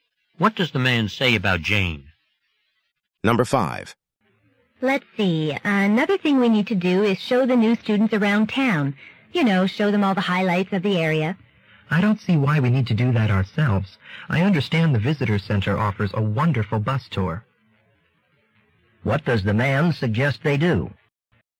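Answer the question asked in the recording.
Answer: Let the new students take the visitor center's bus tour.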